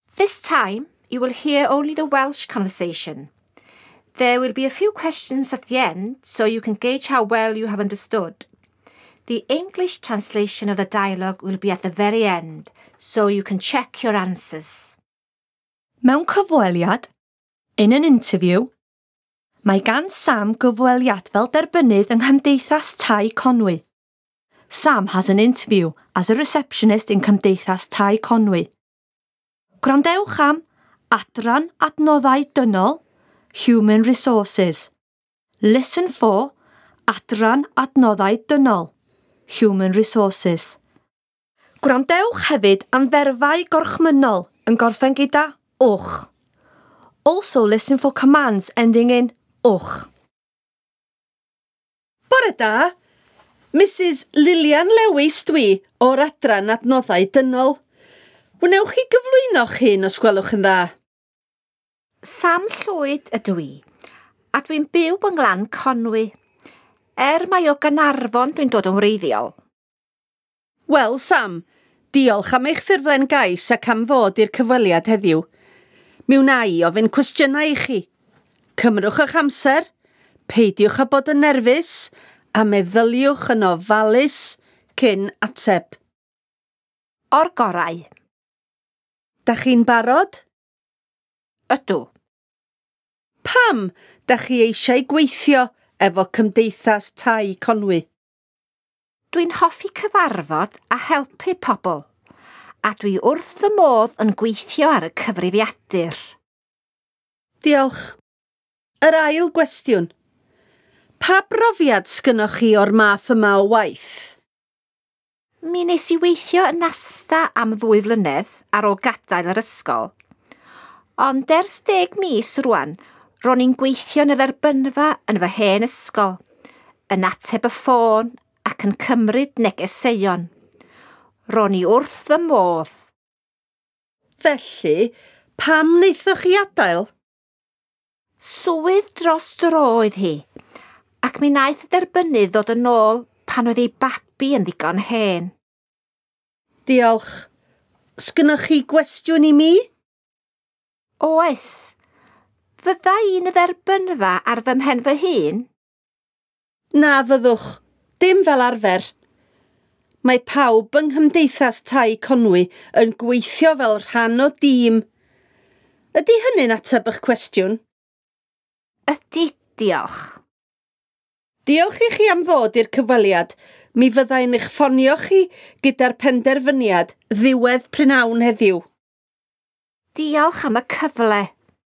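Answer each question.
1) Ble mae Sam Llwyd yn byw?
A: Glan Conwy

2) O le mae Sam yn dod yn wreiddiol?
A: Caernarfon

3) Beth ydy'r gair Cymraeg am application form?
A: Ffurflen gais

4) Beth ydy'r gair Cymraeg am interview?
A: Cyfweliad

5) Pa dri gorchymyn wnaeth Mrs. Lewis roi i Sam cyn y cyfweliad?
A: Cymrwch eich amser, peidiwch â bod yn nerfus, meddyliwch yn ofalus cyn ateb

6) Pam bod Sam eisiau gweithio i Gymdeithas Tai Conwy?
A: Mae'n hoffi cyfarfod a helpu pobl ac mae wrth ei fodd yn gweithio ar y cyfrifiadur

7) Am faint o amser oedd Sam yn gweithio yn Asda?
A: Dwy flynedd

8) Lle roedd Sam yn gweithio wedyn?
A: Yn y dderbynfa yn ei hen ysgol

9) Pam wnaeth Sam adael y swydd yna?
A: Swydd dros dro oedd hi; daeth y derbynnydd yn ôl pan oedd ei babi yn ddigon hen

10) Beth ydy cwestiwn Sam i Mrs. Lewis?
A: Fydda i'n gweithio yn y dderbynfa ar fy mhen fy hun?

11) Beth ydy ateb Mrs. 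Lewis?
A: Na fyddwch, dim fel arfer; mae pawb yn gweithio fel rhan o dîm

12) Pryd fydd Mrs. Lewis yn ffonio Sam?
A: Ddiwedd prynhawn heddiw

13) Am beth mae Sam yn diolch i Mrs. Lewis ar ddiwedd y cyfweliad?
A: Am y cyfle

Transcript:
This time you will hear only the Welsh conversation. There will be a few questions at the end so you can gauge how well you have understood. The English translation of the dialogue will be at the very end – so you can check your answers!
Mewn cyfweliad – In an interview.
Mae gan Sam gyfweliad fel derbynnydd yng Nghymdeithas Tai Conwy.~~Sam has an interview as a receptionist in Cymdeithas Tai Conwy.~~Gwrandewch am Adran Adnoddau Dynol (Human Resources)~~Listen for Adran Adnoddau Dynol (Human Resources)~~Gwrandewch hefyd am ferfau gorchmynnol yn gorffen gyda –wch.~~Also\, listen for Commands – ending in –wch.
Mrs. Lewis: Bore da. Mrs. Lilian Lewis dwi o'r Adran Adnoddau Dynol. 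Wnewch chi gyflwyno'ch hun os gwelwch yn dda?
Sam : Sam Llwyd ydw i a dwi'n byw yng Nglan Conwy er mai o Gaernarfon dwi'n dod yn wreiddiol.
Mrs. Lewis: Wel\, Sam. Diolch am eich ffurflen gais ac am ddod i'r cyfweliad heddiw. Mi wna i ofyn cwestiynau i chi. Cymrwch eich amser\, peidiwch â bod yn nerfus a meddyliwch yn ofalus cyn ateb.
Sam: O'r gorau.
Mrs. Lewis: Dach chi'n barod?
Sam: Ydw.
Mrs. Lewis: Pam dach chi eisiau gweithio efo Cymdeithas Tai Conwy?
Sam: Dwi'n hoffi cyfarfod a helpu pobl a dwi wrth fy modd yn gweithio ar y cyfrifiadur.
Mrs Lewis: Diolch.
Yr ail gwestiwn: pa brofiad sgynnoch chi o'r math yma o waith?
Sam: Mi wnes i weithio yn Asda am ddwy flynedd ar ôl gadael yr ysgol ond ers deg mis rwan ro'n i'n gweithio yn y dderbynfa yn fy hen ysgol\, yn ateb y ffôn ac yn cymryd negeseuon. Ro'n i wrth fy modd!
Mrs Lewis: Felly\, pam wnaethoch chi adael?
Sam: Swydd dros-dro oedd hi ac mi wnaeth y derbynnydd ddod yn ôl pan oedd ei babi yn ddigon hen,
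Mrs Lewis: Diolch.
Sgynnoch chi gwestiwn i mi?
Sam: Oes. Fydda i'n y Dderbynfa ar fy mhen fy hun?
Mrs. Lewis: Na fyddwch. Dim fel arfer. Mae pawb yng Nghymdeithas Tai Conwy'n gweithio fel rhan o dîm. Ydy hynny'n ateb eich cwestiwn?
Sam. Ydy diolch.
Mrs Lewis.: Diolch i chi am ddod i'r cyfweliad. Mi fydda i'n eich ffonio chi gyda'r penderfyniad ddiwedd prynhawn heddiw.
Sam. Diolch am y cyfle.

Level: Level 3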